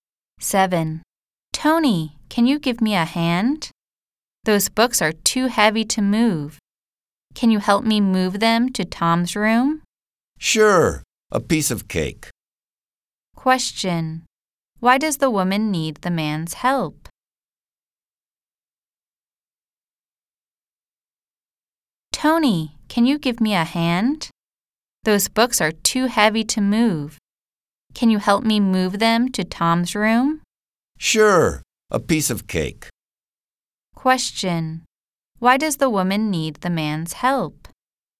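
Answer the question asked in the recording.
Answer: The books are too heavy to move.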